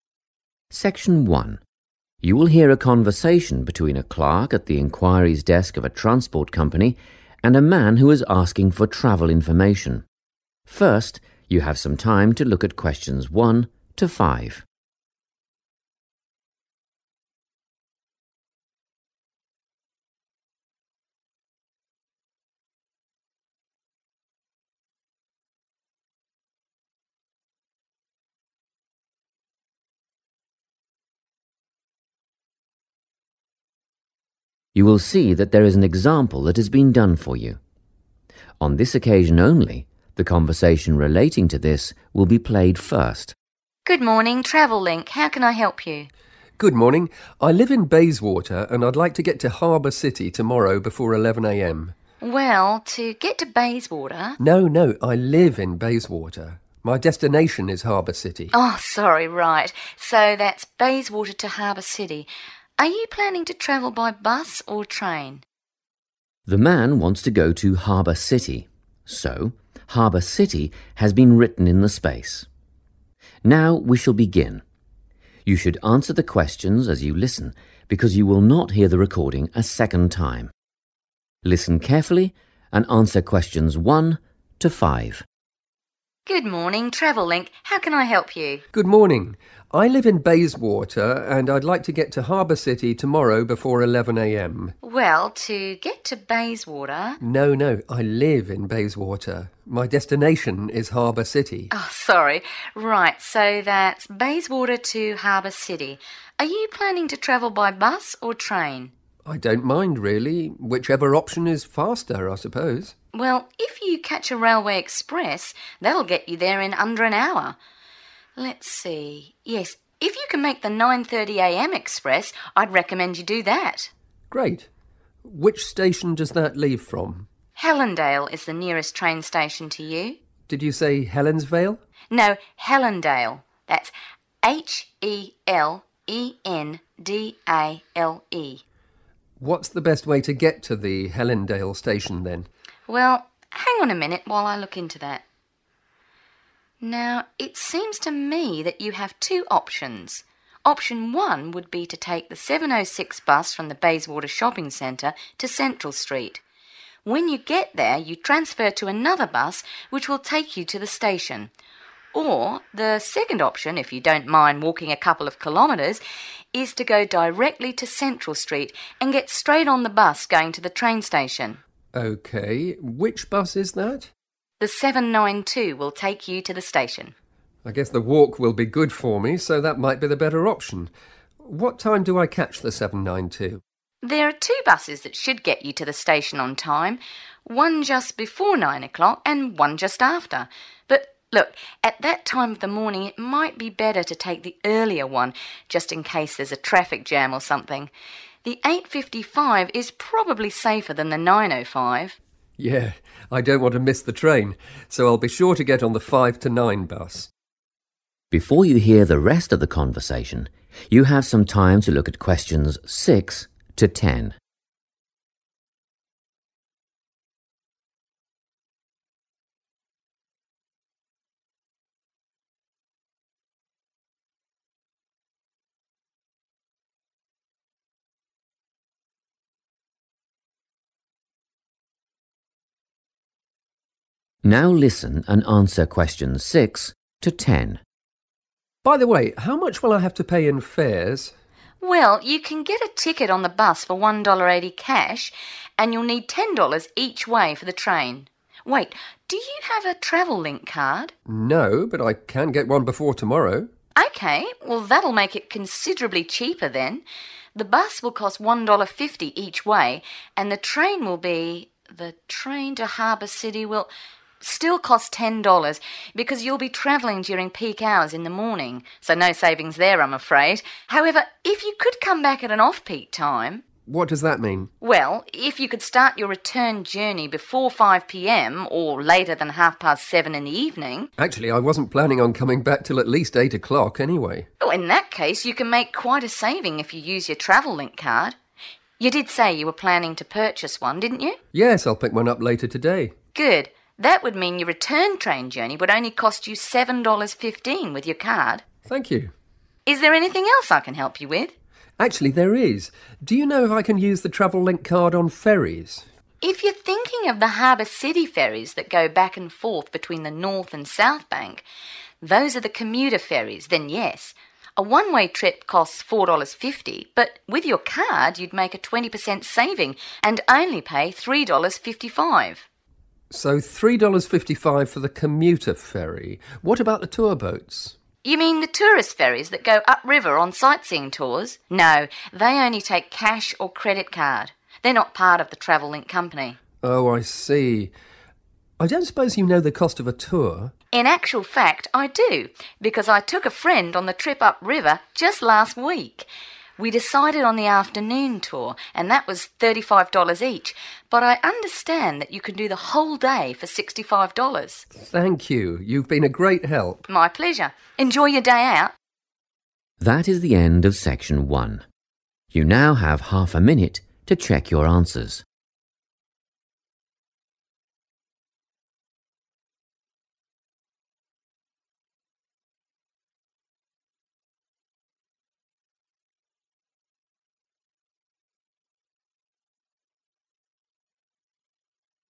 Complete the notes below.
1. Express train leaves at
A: 9.30 am / 9.30 / 9:30 am / 9:30

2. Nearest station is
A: Helendale

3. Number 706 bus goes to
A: Central Street / Central St

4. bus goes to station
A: 792

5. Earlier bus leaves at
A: 8.55 am / 8.55 / 8:55 am / 8:55

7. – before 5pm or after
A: 7.30 / 7:30

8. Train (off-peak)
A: 7.15 / 7:15

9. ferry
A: commuter

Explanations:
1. The correct answer is 9.30 (am) because the woman at the travel desk suggests the man take a 'railway express' train. When checking the schedule, she mentions that there is a 9.30am express train that would be a good choice for his trip. The words 'railway express' match the note's 'Express train', and '9.30am' is the time it leaves.
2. The correct answer is Helendale because the woman says it is the nearest train station to the man. When the man thinks she said 'Helensvale', she corrects him and spells out the name letter by letter to make it very clear. In English, 'nearest' means 'the closest' or 'at the shortest distance away'.
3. The correct answer is Central Street because the transport clerk explains the first travel option to the man. She states that the 706 bus travels from the Bayswater Shopping Centre directly to Central Street. In this context, 'goes to' indicates the destination or the next stop of that specific bus route.
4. The correct answer is 792 because, in the conversation, the man asks which bus goes to the station. The woman directly answers that the 792 is the one that will take him there. You should listen for the word 'bus' followed by a number to find this information.
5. The correct answer is 8.55 (am) because the woman at the transport office mentions two buses that go to the station: one at 8.55 and one at 9.05. She advises the man to take the 'earlier' one to make sure he does not miss his train in case of a traffic jam. In this context, 'earlier' refers to 8.55 because it occurs before 9.05.
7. The correct answer is 7.30 because the clerk describes the 'off-peak' hours (times when it is cheaper to travel) for the train. She says that starting a return journey 'later than half past 7 in the evening' will save money. In English, 'half past 7' is a way to say 7:30.
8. The correct answer is 7.15 because the woman explains that the man can save money if he travels back home during off-peak times using his Travel Link Card. She specifically states that the cost for this train journey would be $7.15.
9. The correct answer is "commuter" because the transport clerk describes the ferry that runs between the north and south banks as the "commuter ferry." She mentions that its cash price is $4.50 and the card price is $3.55, which matches the figures shown in the table for that row.

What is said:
Test 1
You will hear a number of different recordings and you will have to answer questions on what you hear. There will be time for you to read the instructions and questions and you will have a chance to check your work. All the recordings will be played once only. The test is in 4 sections. At the end of the test you will be given 10 minutes to transfer your answers to an answer sheet. Now turn to section 1.
Section 1
You will hear a conversation between a clerk at the enquiries desk of a transport company and a man who is asking for travel information. First you have some time to look at questions 1 to 5.
You will see that there is an example that has been done for you. On this occasion only the conversation relating to this will be played first.
WOMAN: Good morning, Travel Link. How can I help you?
MAN: Good morning. I live in Bayswater and I'd like to get to Harbour City tomorrow before 11am.
WOMAN: Well, to get to Bayswater ...
MAN: No, no. I live in Bayswater – my destination is Harbour City.
WOMAN: Sorry. Right; so that's Bayswater to Harbour City. Are you planning to travel by bus or train?
The man wants to go to Harbour City, so Harbour City has been written in the space. Now we shall begin. You should answer the questions as you listen because you will not hear the recording a second time. Listen carefully and answer questions 1 to 5.
MAN: I don't mind really, whichever option is faster, I suppose.
WOMAN: Well, if you catch a railway express, that'll get you there in under an hour ... Let's see – yes, if you can make the 9.30am express, I'd recommend you do that.
MAN: Great. Which station does that leave from?
WOMAN: Helendale is the nearest train station to you.
MAN: Did you say Helensvale?
WOMAN: No, Helendale – that's H-E-L-E-N-D-A-L-E
MAN: What's the best way to get to the Helendale station then?
WOMAN: Well, hang on a minute while I look into that ... Now, it seems to me that you have two options. Option one would be to take the 706 bus from the Bayswater Shopping Centre to Central Street. When you get there, you transfer to another bus which will take you to the station. Or, the second option, if you don't mind walking a couple of kilometres, is to go directly to Central Street and get straight on the bus going to the train station.
MAN: Okay. Which bus is that?
MAN: I guess the walk will be good for me so that might be the better option. What time do I catch the 792?
WOMAN: There are two buses that should get you to the station on time: one just before nine o'clock and one just after. But look, at that time of the morning it might be better to take the earlier one just in case there's a traffic jam or something. The 8.55 is probably safer than the 9.05.
MAN: Yeah, I don't want to the miss the train, so I'll be sure to get on the five- to-nine bus.
Before you hear the rest of the conversation, you have some time to look at questions 6 to 10.
Now listen and answer questions 6 to 10.
MAN: By the way, how much will I have to pay in fares?
WOMAN: Well, you can get a ticket on the bus for $1.80 cash and you'll need $10 each way for the train. Wait, do you have a Travel Link Card?
MAN: No, but I can get one before tomorrow.
WOMAN: Okay, well that'll make it considerably cheaper then. The bus will cost $1.50 each way, and the train will be – the train to Harbour City will ... still cost $10.00 because you'll be travelling during peak hours in the morning, so no savings there, I'm afraid. However, if you could come back at an off-peak time ...
MAN: What does that mean?
WOMAN: Well, if you could start your return journey before 5pm or later than half past 7 in the evening ...
MAN: Actually, I wasn't planning on coming back till at least 8 o'clock anyway.
WOMAN: In that case, you can make quite a saving if you use your Travel Link Card. You did say you were planning to purchase one, didn't you?
MAN: Yes, I'll pick one up later today.
WOMAN: Good – that would mean that your return train journey would only cost you $7.15 with your card.
MAN: Thank you.
WOMAN: Is there anything else I can help you with?
MAN: Actually, there is. Do you know if I can use the Travel Link Card on ferries?
WOMAN: If you're thinking of the Harbour City ferries that go back and forth between the north and south bank, those are the commuter ferries, then yes. A one-way trip costs $4.50 but with your card you'd make a 20% saving and only pay $3.55.
MAN: So, $3.55 for the commuter ferry ...What about the tour boats?
WOMAN: You mean the tourist ferries that go upriver on sightseeing tours? No – they only take cash or credit card. They're not part of the Travel Link Company.
MAN: Oh, I see. I don't suppose you know the cost of a tour?
WOMAN: In actual fact, I do, because I took a friend on the trip upriver just last week. We decided on the afternoon tour and that was $35 each but I understand that you can do the whole day for $65.
MAN: Thank you. You've been a great help.
WOMAN: My pleasure. Enjoy your day out.
That is the end of section 1. You now have half a minute to check your answers.